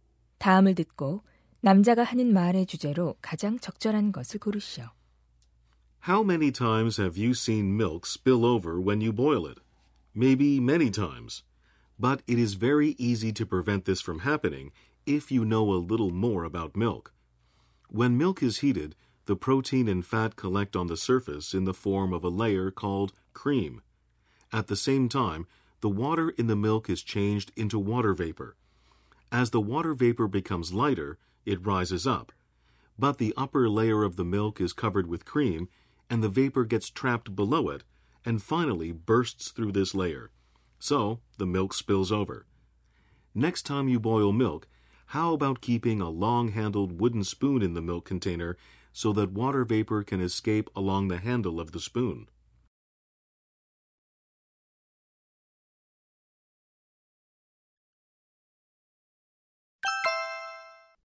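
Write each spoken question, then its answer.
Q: 다음을 듣고 남자가 하는 말의 주제로 가장 적절한 것을 고르시오.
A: 우유를 끓일 때 넘치는 이유와 이를 막는 방법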